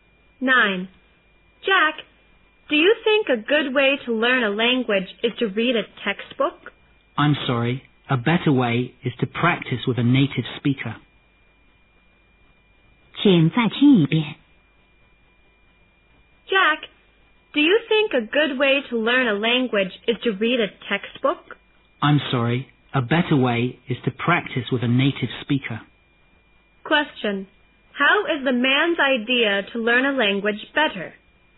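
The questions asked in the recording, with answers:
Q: Question.How is the man's idea to learn a language better?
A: Practice with a native speaker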